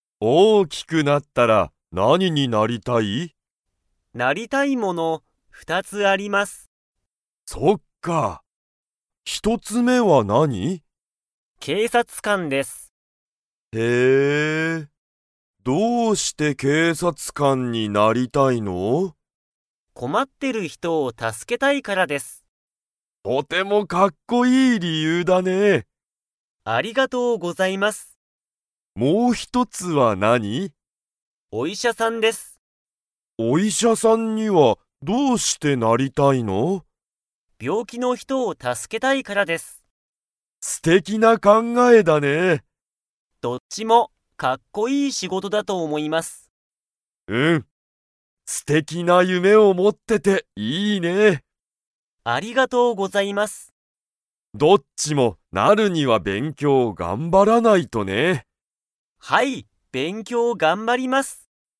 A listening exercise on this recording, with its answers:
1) ゆうは大人おとなになったら、困こまってる人ひとを 。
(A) 助たすけたい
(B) 助たすけたくない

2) ゆうは、何なにを頑張がんばらないといけませんか?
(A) スポーツ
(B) 料理りょうり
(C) 勉強べんきょう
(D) 警察けいさつ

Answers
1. (A) 助たすけたい
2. (C) 勉強べんきょう

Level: Level 4

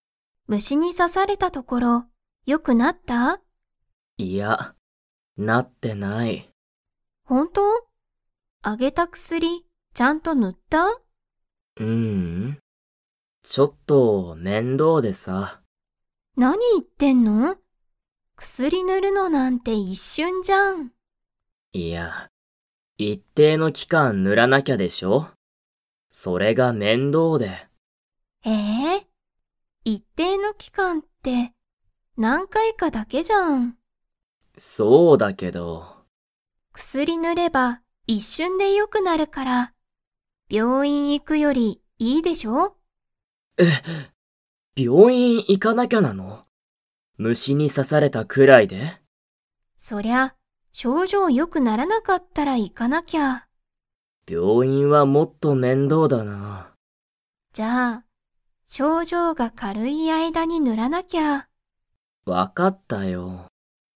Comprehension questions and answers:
Comprehension Quiz (Skip if you don't understand the conversation yet)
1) タケシは薬くすりを塗ぬりましたか?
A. はい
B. いいえ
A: B. いいえ

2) タケシは、薬くすりを塗ぬるより に行いくのがもっと面倒めんどうだ。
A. 症状しょうじょう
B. 学校がっこう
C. 病院びょういん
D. 仕事しごと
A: C. 病院びょういん

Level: Level 4

